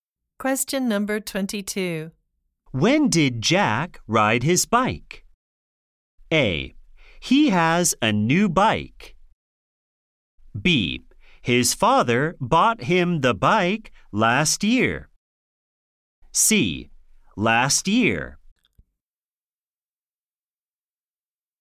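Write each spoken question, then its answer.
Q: When did Jack ride his bike?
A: C: Last year.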